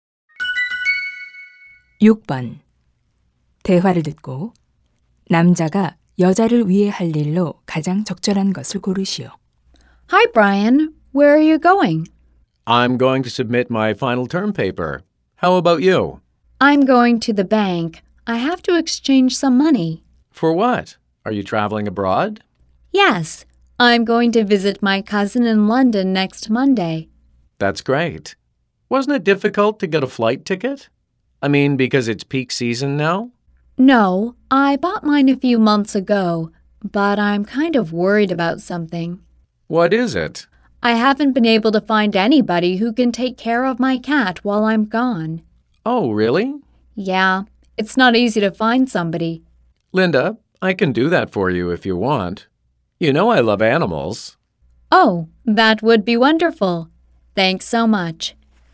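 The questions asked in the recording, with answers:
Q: 대화를 듣고 남자가 여자를 위해 할 일로 가장 적절한 것을 고르시오.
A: 여자의 고양이 돌봐 주기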